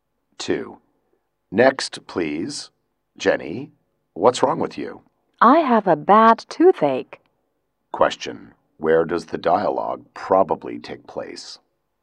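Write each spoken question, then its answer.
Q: Where does the dialogue probably take place?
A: At a dentist's / hospital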